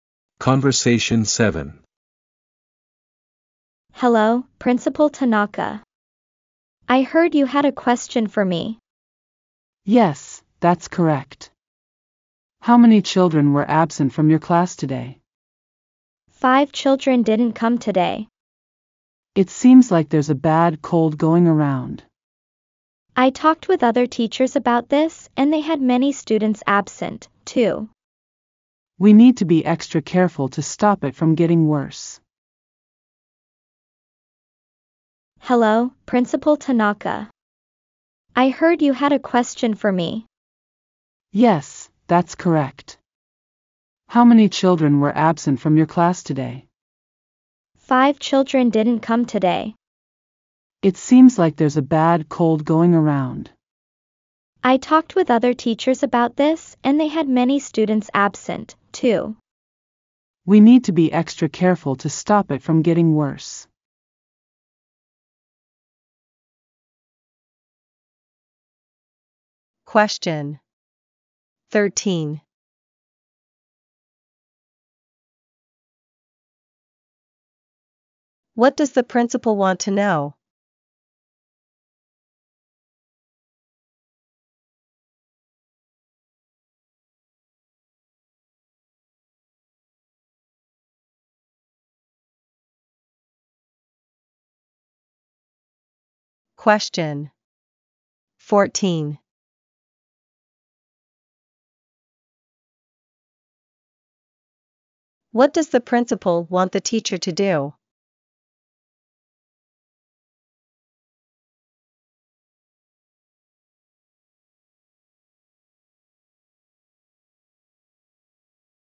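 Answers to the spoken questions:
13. How many children were absent from the class today
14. Be extra careful to stop the cold from getting worse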